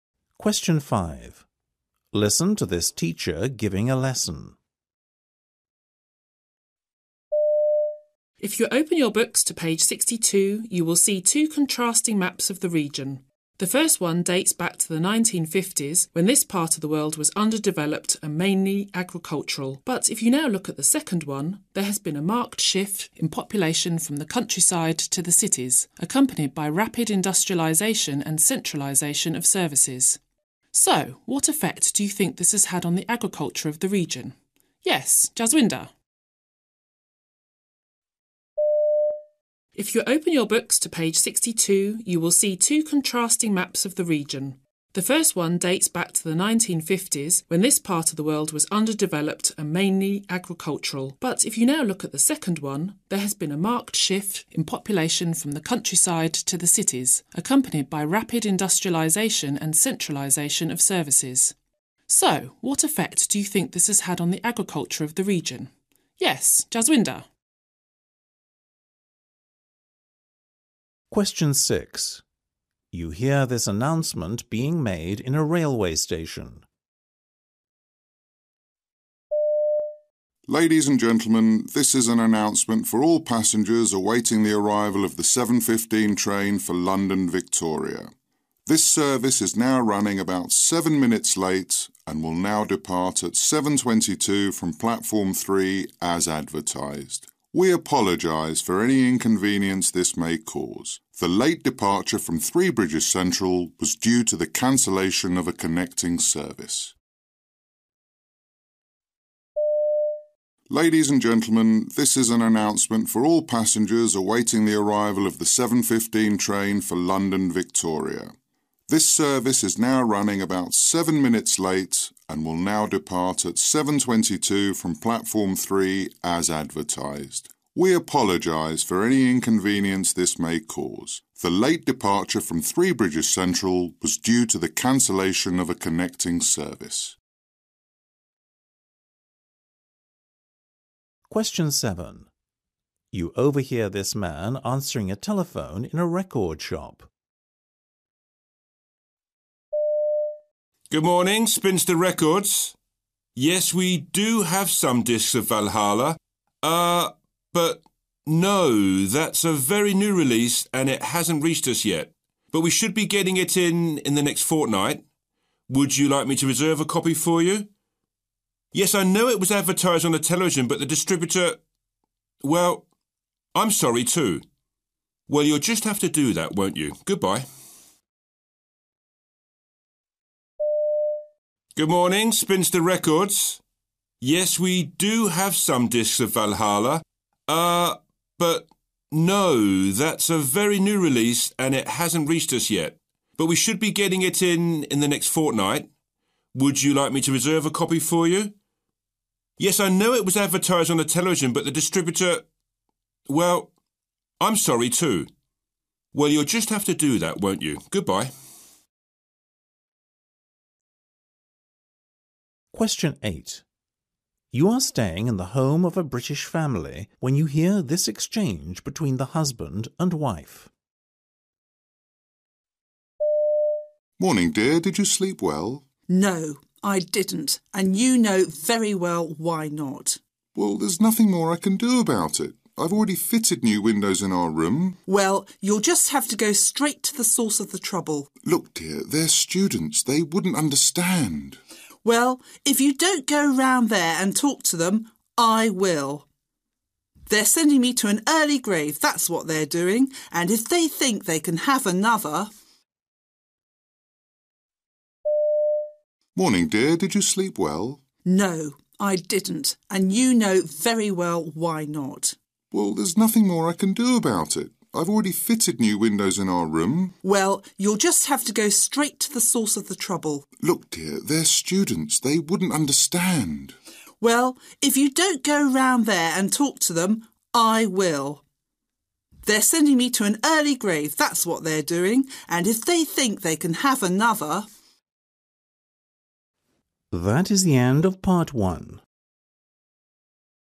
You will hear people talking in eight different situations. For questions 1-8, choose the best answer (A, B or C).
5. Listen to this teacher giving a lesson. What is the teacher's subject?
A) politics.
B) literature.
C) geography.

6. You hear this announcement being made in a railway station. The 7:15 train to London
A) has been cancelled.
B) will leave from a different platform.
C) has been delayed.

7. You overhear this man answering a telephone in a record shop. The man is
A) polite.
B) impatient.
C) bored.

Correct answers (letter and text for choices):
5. C) geography.
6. C) has been delayed.
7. B) impatient.

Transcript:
Ah yes, it was the winter of '47. I distinctly remember your good father playing in the school yard.
W: So you were his form master that year?
M: No, no, no arithmetic and geometry ... we taught proper subjects in those days ...
W: So, how did you know that I was his daughter?
M: It's the shape of your ears ... (turning to his friend) his father had them, too ... very distinctive ears ...
5 Listen to this teacher giving a lesson.
If you open your books to page 62, you will see two contrasting maps of the region. The first one dates back to the 1950's when this part of the world was underdeveloped and mainly agricultural, but if you now look at the second one, there has been a marked shift in population from the countryside to the cities, accompanied by rapid industrialisation and centralisation of services. So, what effect do you think this has had on the agriculture of this region? Yes, Jaswinda?
6 You hear this announcement being made in a railway station.
Ladies and gentlemen, this is an announcement for all passengers awaiting the arrival of the 7:15 train for London, Victoria. This service is now running about 7 minutes late and will now depart at 7:22 from platform 3 as advertised. We apologise for any inconvenience this may cause. The late departure from Three Bridges Central was due to the cancellation of a connecting service.
7 You overhear this man answering a telephone in a record shop.
Good morning, Spinster Records ... Yes, we do have some discs of 'Valhalla' ... Ah, but ... no, that's a very new release and it hasn't reached us yet ... but we should be getting it in the next fortnight ... Would you like me to reserve a copy for you? Yes, I know it was advertised on television but the distributor ... Well, I'm sorry, too ... Well, you'll just have to do that, won't you ... Goodbye.
8 You are staying in the home of a British family when you hear this exchange between the husband and wife.
M: Morning dear. Did you sleep well?
W: No, I didn't, and you know very well why not.
M: Well, there's nothing more I can do about it. I've already fitted new windows in our room.
W: Well, you'll just have to go straight to the source of the trouble.
M: Look dear, they're students, they wouldn't understand.
W: Well, if you don't go round there and talk to them, ... I will. They're sending me to an early grave, that's what they're doing. And if they think they can have another...